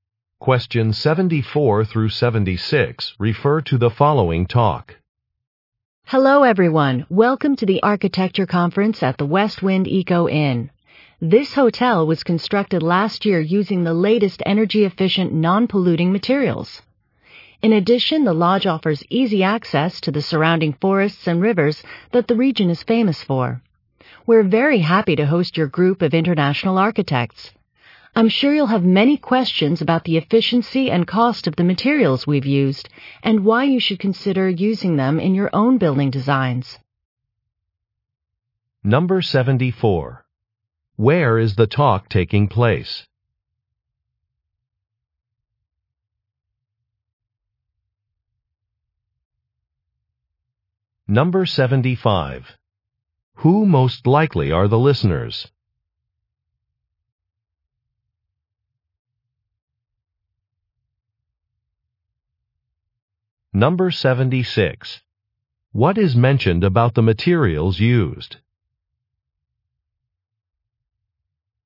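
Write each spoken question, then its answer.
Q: Where is the talk taking place?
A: At a hotel (the West Wind Eco Inn)

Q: Who most likely are the listeners?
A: Architects

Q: What is mentioned about the materials used?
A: They are energy-efficient and non-polluting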